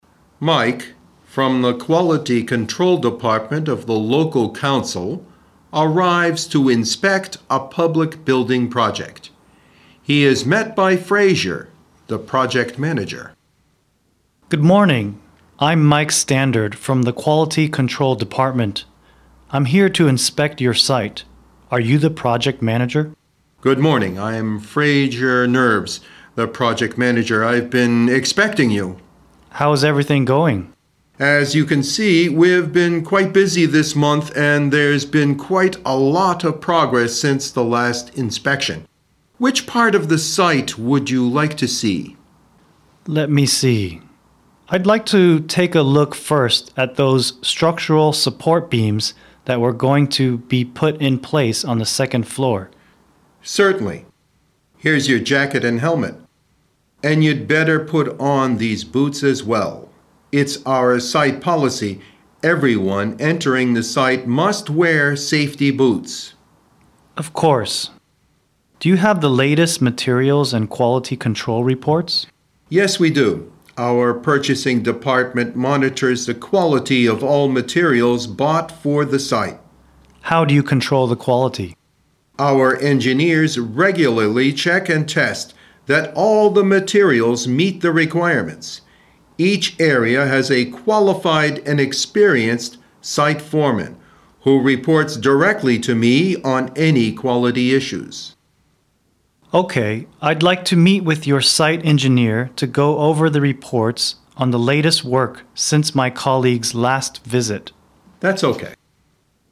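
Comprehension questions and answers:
点击听对话录音,根据对话内容判断正误(每题10分)。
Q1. Mike is met by an engineer at the construction site.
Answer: F

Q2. The construction site doesn't look very busy.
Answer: F

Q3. Mike doesn't inspect the whole construction site.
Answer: T

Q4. It is not the first time the construction site being inspected.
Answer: T

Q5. Fraser knows clearly how the quality is controlled at the construction site.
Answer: T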